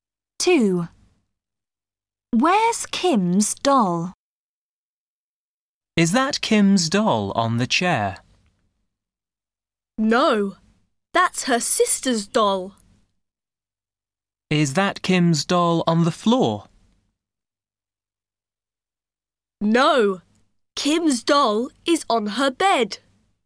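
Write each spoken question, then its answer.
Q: Where's Kim's doll?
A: On her bed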